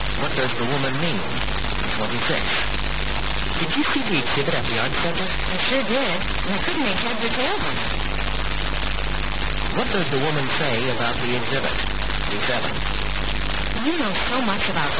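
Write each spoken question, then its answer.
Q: What does the woman say about the exhibit?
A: She couldn't understand it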